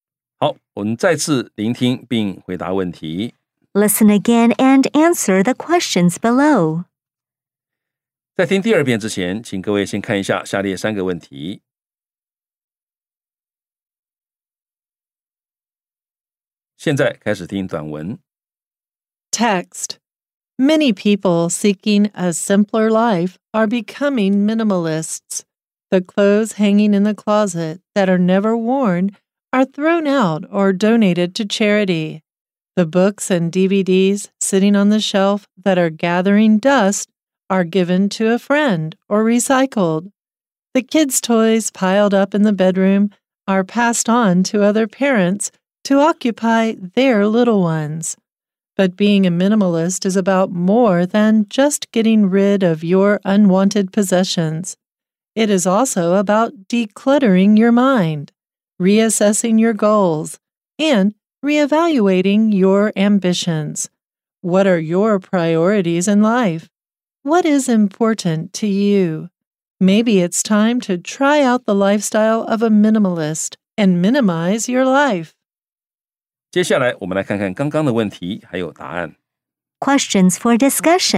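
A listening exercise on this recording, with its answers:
再次聆聽並回答問題 Listen again and answer the questions below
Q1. What do minimalists usually do with the clothes that are never worn?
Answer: They throw them out or donate them to charity.

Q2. What can minimalist parents do about their kids' toys?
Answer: Pass them on to other parents to occupy their little ones.

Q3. What can being a minimalist do for you spiritually?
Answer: Declutter your mind, reassess your goals and reevaluate your ambitions.

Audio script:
Many people seeking a simpler life are becoming minimalists. The clothes hanging in the closet that are never worn are thrown out or donated to charity. The books and DVDs sitting on the shelf that are gathering dust are given to a friend or recycled. The kids' toys piled up in the bedroom are passed on to other parents to occupy their little ones.
But being a minimalist is about more than just getting rid of your unwanted possessions. 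It is also about de-cluttering your mind, re-assessing your goals, and re-evaluating your ambitions. What are your priorities in life? What is important to you?

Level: 中階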